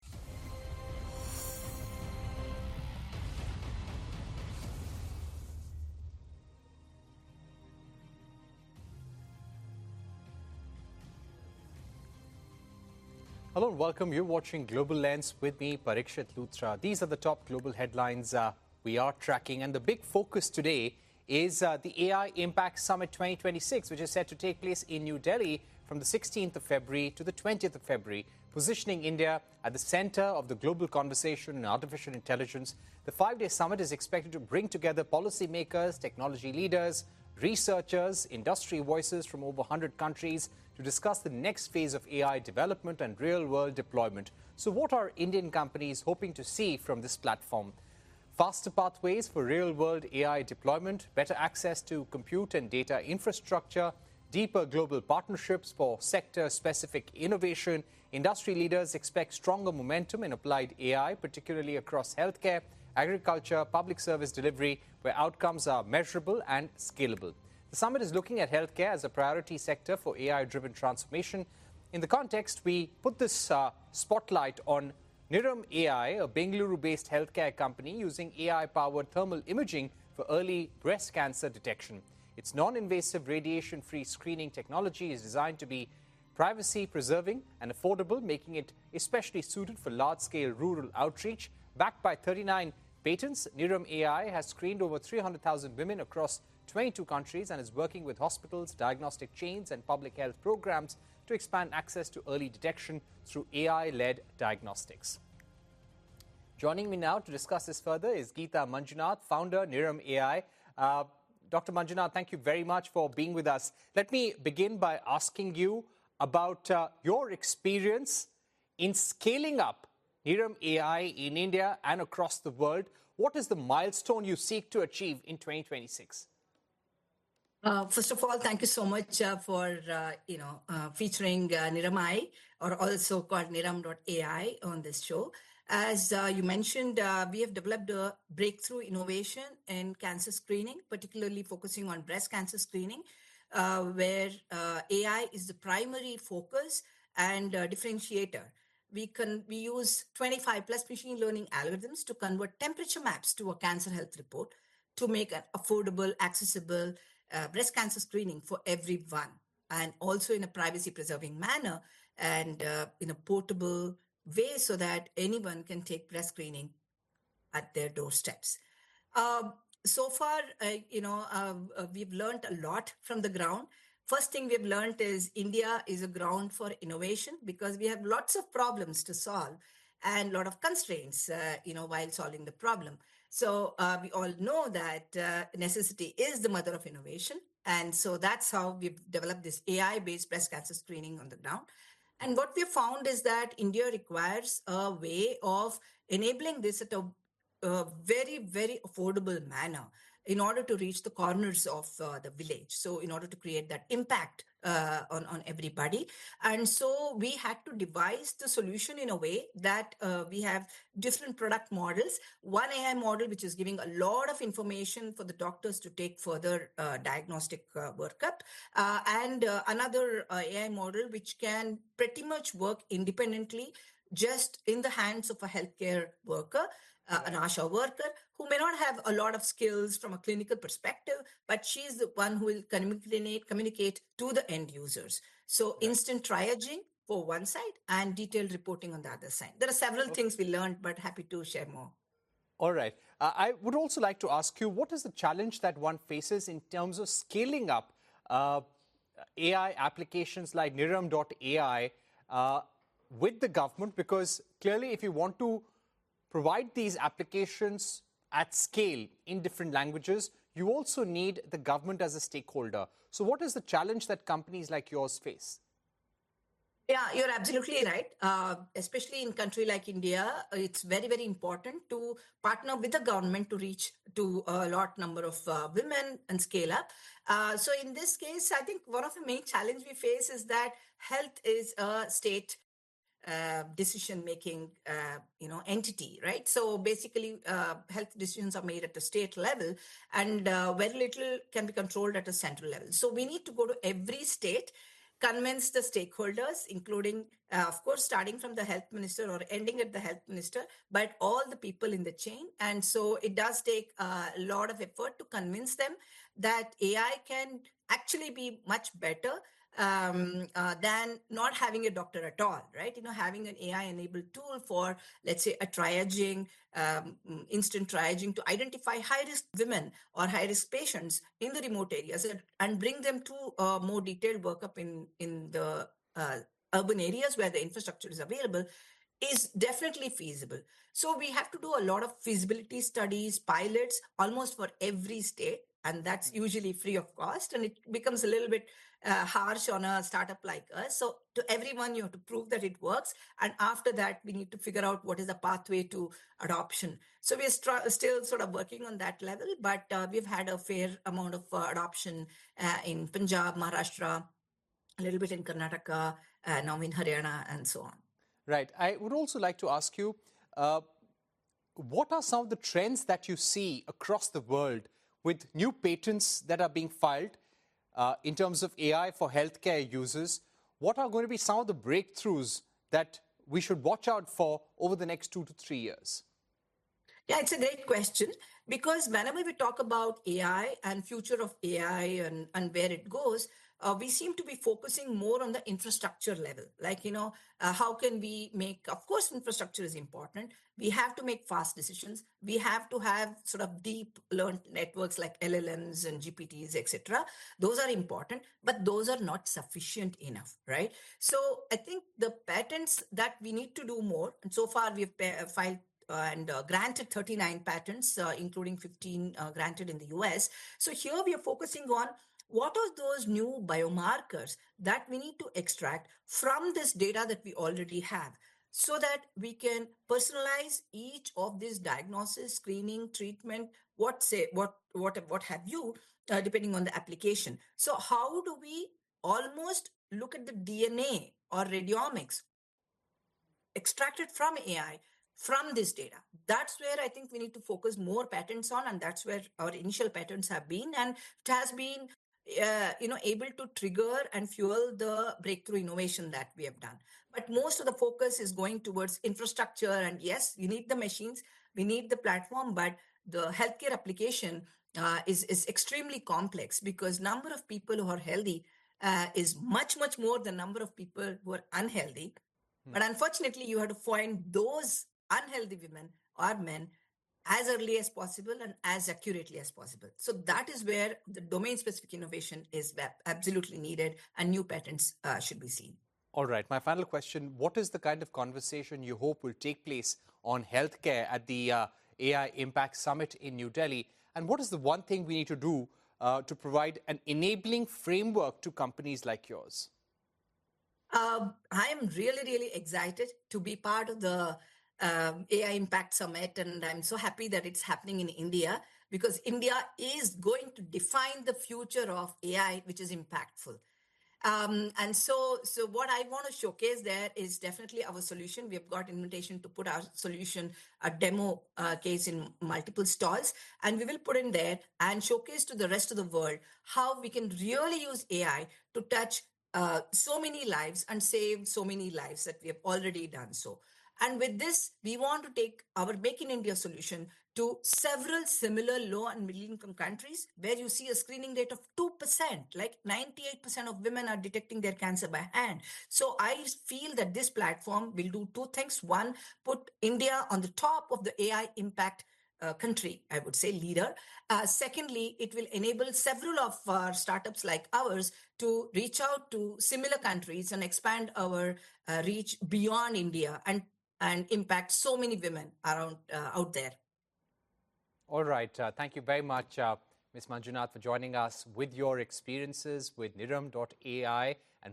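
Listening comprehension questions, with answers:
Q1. What is the name of the Bengaluru-based healthcare company featured in the interview, and what specific technology does it use for early breast cancer detection?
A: Niram AI (Niramai); it uses AI-powered thermal imaging for early breast cancer detection.

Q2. How many women has Nuram AI screened, and across how many countries, according to the host's introduction?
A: Over 300,000 women across 22 countries.

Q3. According to Dr. Mangjinad, what is one of the main challenges in scaling up AI applications like hers with the government in India, and which states have shown some adoption?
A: Health decisions are made at state level, so they must convince every state separately; adoption in Punjab, Maharashtra, a little in Karnataka, and now Haryana.

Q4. What specific number of patents does Nuram AI have, and how many of those are granted in the US, as mentioned by the founder?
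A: 39 patents, with 15 granted in the US.

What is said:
Hello and welcome. You're watching Global Lens with me, Parikshit Lutra.
These are the top global headlines we are tracking.
And the big focus today is the AI Impact Summit 2026,
These are the top global headlines uh we are tracking and the big focus today is the AI impact summit 2026 which is set to take place in New Delhi from the 16th of February to the 20th of February positioning India at the center of the global conversation in artificial intelligence. The 5-day summit is expected to bring together policy makers, technology leaders, researchers, industry voices from over 100 countries to discuss the next phase of AI development
and real world deployment. So what are Indian companies hoping to see from this platform? Faster pathways for real world AI deployment, better access to compute and data infrastructure, deeper global infrastructure, deeper global partnerships for sector specific innovation. 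Industry leaders expect stronger momentum in applied AI particularly across healthcare, particularly across healthcare, agriculture, public service delivery where outcomes are measurable and scalable. The summit is looking at healthcare as a priority sector for AIdriven transformation. In the context we put this uh spotlight on Nam AI, a Bengaluru based
healthcare company using AI powered thermal imaging for early breast cancer detection. Its non-invasive radiationfree screening non-invasive radiationfree screening technology is designed to be privacy preserving and affordable making it especially suited for large-scale rural outreach. Backed by 39 patents, Nurum AI has screened over 300,000 women across 22 countries and is working with hospitals, diagnostic chains and public health programs to expand access to early detection through AIEL diagnostics. diagnostics. Joining me now to discuss this further is Gita Mangjinad, founder Nuram AI. 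Uh Dr. Mangjinad, thank you very
much for being with us. Let me begin by asking you about uh your experience in scaling up AI in India and across the world. What is the milestone you seek to achieve in 2026? achieve in 2026? >> Uh first of all, thank you so much for uh you know uh featuring NAMI or also called NIAM.AI on this show. As uh you mentioned uh we have developed a breakthrough innovation in cancer screening particularly focusing on breast cancer screening uh where uh AI is the primary focus and
differentiator. We can we use 25 plus machine learning algorithms to convert temperature maps to a cancer health report to make an affordable accessible uh breast cancer screening for everyone and also in a privacy preserving manner and uh in a portable way so that anyone can take breast screening at their doorsteps. Um so far you know u we've learned a lot from the ground. First thing we have learned is India is a ground for innovation because we have lots of problems to solve and lot of constraints
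uh you know while solving the problem. So uh we all know that uh necessity is the mother of innovation and so that's how we've developed this AI based breast cancer screening on the ground and what we found is that India requires a way of enabling this at a a very very affordable manner in order to reach the corners of uh the village. So in order to create that impact uh on on everybody and so we had to devise the solution in a way that uh we
have different product models. one AI model which is giving a lot of information for the doctors to take further uh diagnostic workup uh and another AI model which can pretty much work independently just in the hands of a healthcare worker an asha worker who may not have a lot of skills from a clinical perspective but she's the one who will communicate communicate to the end users so instant triaging for one side and detailed reporting on the other side there are several things we learned but happy
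to share All right. I would also like to ask you what is the challenge that one faces in terms of scaling up uh AI applications like NIAM.AI like NIAM.AI uh with the government because clearly if you want to provide these applications at scale in different languages you also need the government as a stakeholder. So what is the challenge that companies like yours face? face? >> Yeah, you're absolutely right. uh especially in country like India it's very very important to partner with the government to reach to
a lot number of uh women and scale up uh so in this case I think one of the main challenge we face is that health is a state uh decision making uh you know entity right so basically uh health decisions are made at the state level and uh very little can be controlled at a central level so we need to go to every state convince the stakeholders including uh of starting from the health minister or ending at the health minister but all the people in the
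chain and so it does take a lot of effort to convince them that AI can actually be much better um uh than not having a doctor at all right you know having an AI enabled tool for let's say a triaging um instant triaging to identify high-risisk women or high-risisk patients in the remote areas and bring them to a more detailed workup in in the uh urban areas where the infrastructure is available is definitely feasible. So we have to do a lot of feasibility studies, pilots almost
for every state and that's usually free of cost and it becomes a little bit uh harsh on a startup like us. So to everyone you have to prove that it works and after that we need to figure out what is the pathway to adoption. So we still sort of working on that level but uh we've had a fair amount of adoption uh in Punjab, Maharashtra, a little bit in Karnataka uh now in Hana and so on. >> Right.
what are some of the trends that you see across the world with new patents that are being filed uh in terms of AI for healthare users? 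What are going to be some of the breakthroughs that we should watch out for over the next two to three years? years? Yeah, it's a great question because whenever we talk about AI and future of AI and and where it goes, uh we seem to be focusing more on the infrastructure level like you know how can we make of course
infrastructure is important we have to make fast decisions we have to have sort of deep learned networks like LLMs and GPTs etc. those are important but those are not sufficient enough right so I think the patents that we need to do more and so far we have filed and granted 39 patents including 15 uh granted in the US so here we are focusing on what are those new biomarkers that we need to extract from this data that we already have so that we can personalize each
of these diagnosis screening treatment what say what what what have you uh depending on the application the application So how do we almost look at the DNA or radiomics radiomics extracted from AI from this data that's where I think we need to focus more patents on and that's where our initial patents have been and it has been uh you know able to trigger and fuel the breakthrough innovation that we have done but most of the focus is going towards infrastructure and yes you need the machines
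That's where I think we need to focus more patents on and that's where our initial patents have been.
And it has been, you know, able to trigger and fuel the breakthrough innovation that we have done.
But most of the focus is going towards infrastructure.
And yes, you need the machines, we need the platform, but the healthcare application is, is extremely complex because number of people who are healthy is much, much more the number of people who are unhealthy.
But unfortunately, you have to find those unhealthy women or men as early as possible and as accurately as possible.
So that is where the domain specific innovation is absolutely needed and new patents should be seen.
All right.
My final question, what is the kind of conversation you hope will take place on healthcare at the AI Impact Summit in New Delhi?
And what is the one thing we need to do to provide an enabling framework to companies like yours?
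Um, I am really, really excited to be part of the um AI Impact Summit and I'm so happy that it's happening in India because India is going to define the future of AI, which is impactful.
Um, and so, so what I want to showcase there is definitely our solution.
We've got invitation to put our solution, a demo case in multiple stores and we will put in there and showcase to the rest of the world how we can really use AI to touch so many lives and save so many lives that we have already done so. And.
With this, we want to take our make in India solution to several similar low and middle income countries where you see a screening rate of 2%, like 98% of women are detecting their cancer by hand.
So I feel that this platform will do two things.
One, put India on the top of the AI impact country.
I would say leader.
Secondly, it will enable several of our startups like ours to reach out to similar countries and expand our reach beyond India and, and impact so many women around out there.
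All right, thank you very much, Miss Manjunath for joining us with your experiences with Niram Dot AI and what lies ahead for AI in healthcare, we now shift our focus to NESA AI, a Mumbai based startup founded in 2023.

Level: CEFRB2-C1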